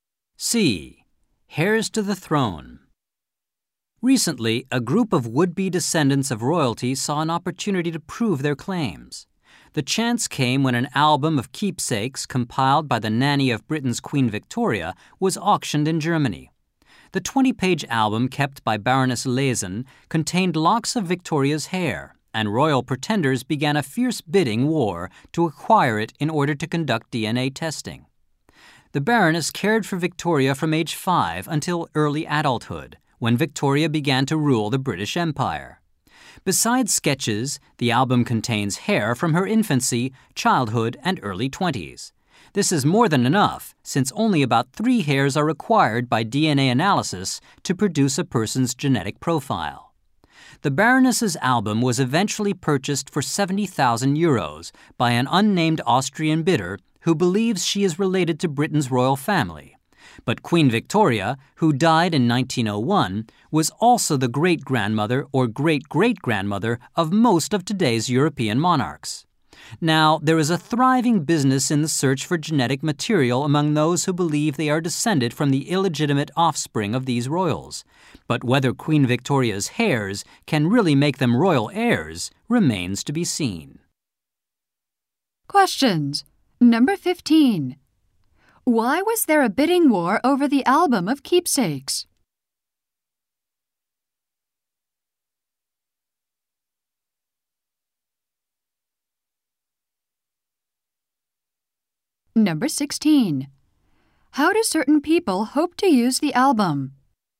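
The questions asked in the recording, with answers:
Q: Why was there a bidding war over the album of keepsakes?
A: It contained locks of Queen Victoria's hair

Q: How do certain people hope to use the album?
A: For DNA testing to prove they are royal descendants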